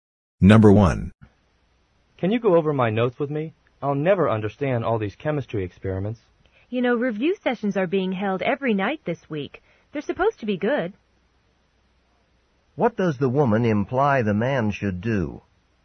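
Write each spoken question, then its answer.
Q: What does the woman imply the man should do?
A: Go to the review sessions held every night this week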